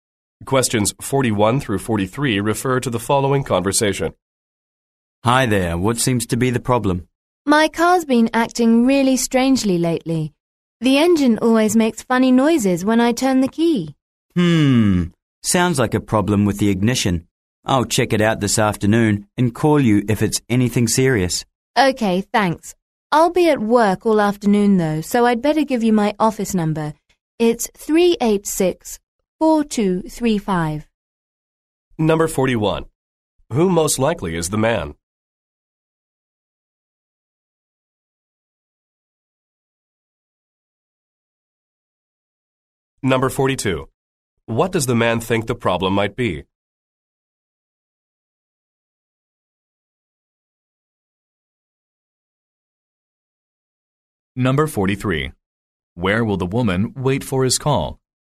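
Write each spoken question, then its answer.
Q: Who most likely is the man?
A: A mechanic

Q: What does the man think the problem might be?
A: The ignition

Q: Where will the woman wait for his call?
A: At work (her office)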